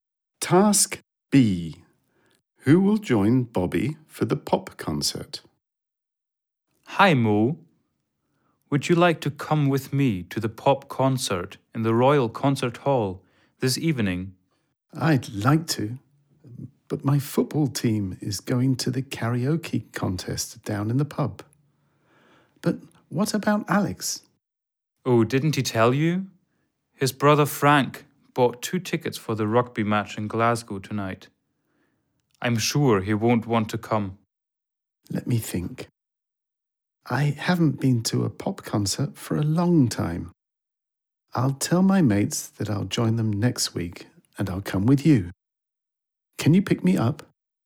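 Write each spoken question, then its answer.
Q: Who will join Bobby for the pop concert?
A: Mo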